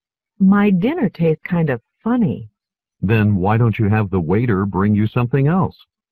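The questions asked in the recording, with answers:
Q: What does the man imply?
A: The woman should ask the waiter for a different dish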